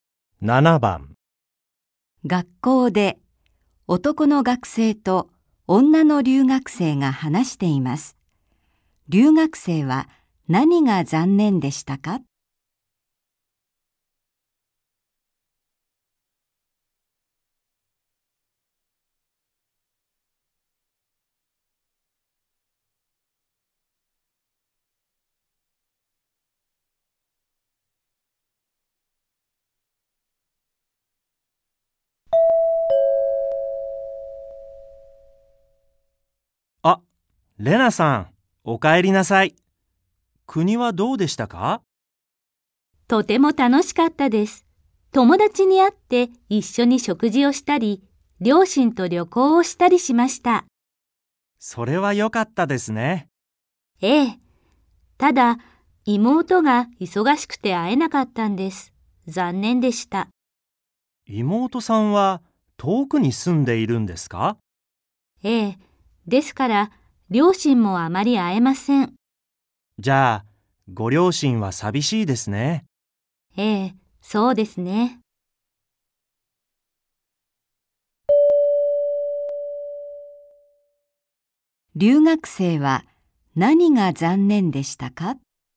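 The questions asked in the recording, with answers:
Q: 留学生は何が残念でしたか?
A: 妹に会えなかったこと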